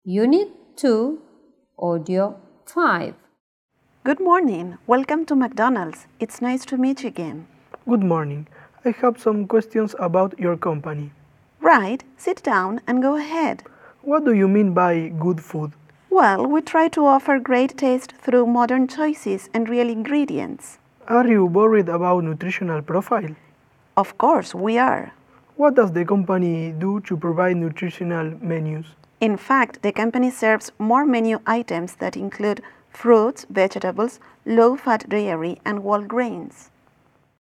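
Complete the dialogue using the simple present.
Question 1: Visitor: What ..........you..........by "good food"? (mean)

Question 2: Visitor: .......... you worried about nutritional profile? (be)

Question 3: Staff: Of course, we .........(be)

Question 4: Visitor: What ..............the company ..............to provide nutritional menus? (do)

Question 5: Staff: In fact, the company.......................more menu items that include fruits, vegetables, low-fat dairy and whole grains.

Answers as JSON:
{"1": "do / mean", "2": "Are", "3": "are", "4": "does / do", "5": "serves"}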